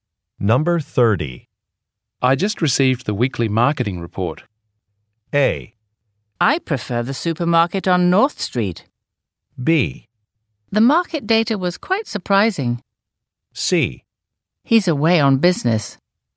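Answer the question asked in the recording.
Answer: B: The market data was quite surprising.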